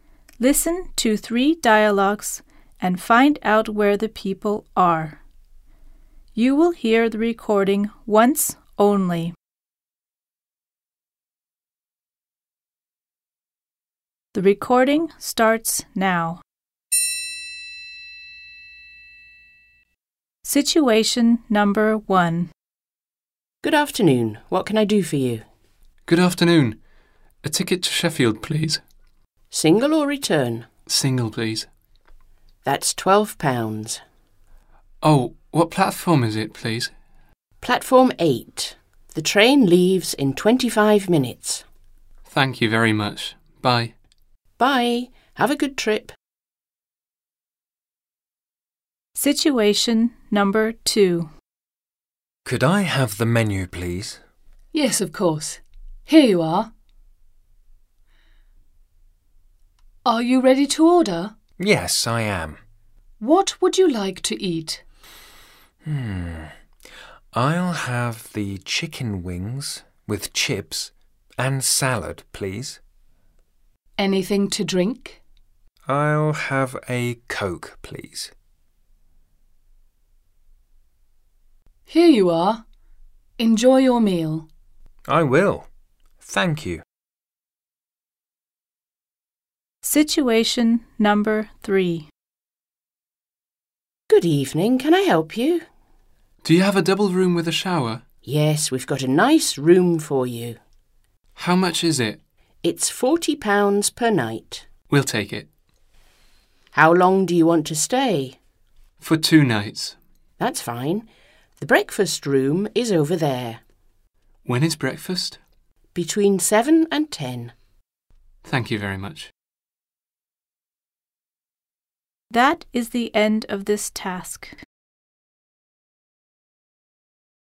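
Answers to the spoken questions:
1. At a train station (ticket office)
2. In a restaurant
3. At a hotel (reception)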